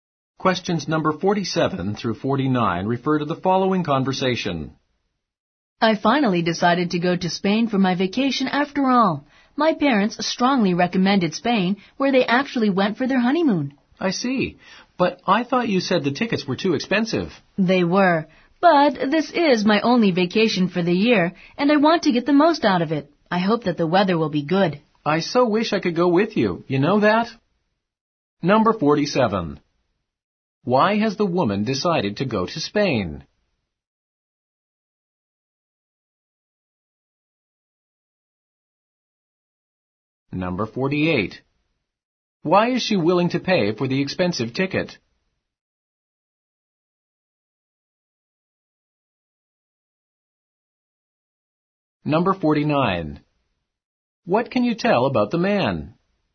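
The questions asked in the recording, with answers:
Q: Why has the woman decided to go to Spain?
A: Her parents strongly recommended it

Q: Why is she willing to pay for the expensive ticket?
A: It is her only vacation of the year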